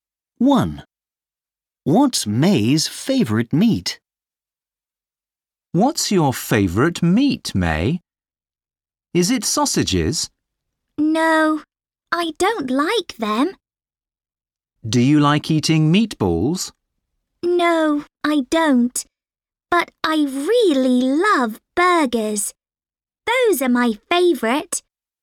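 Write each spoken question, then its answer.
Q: What's May's favourite meat?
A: burgers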